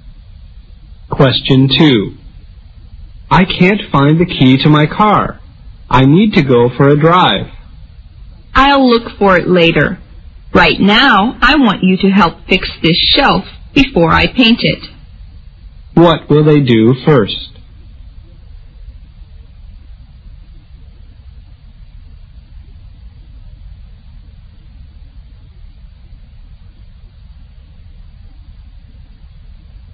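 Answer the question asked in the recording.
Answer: Fix the shelf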